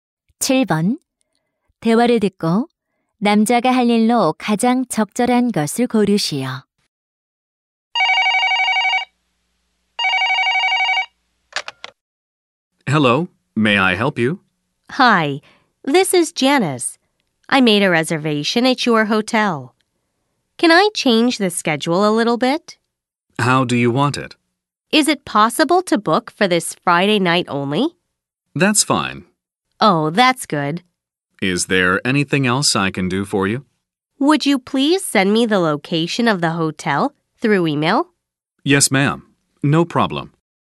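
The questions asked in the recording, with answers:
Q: 대화를 듣고 남자가 할 일로 가장 적절한 것을 고르시오.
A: 호텔 위치를 이메일로 보내기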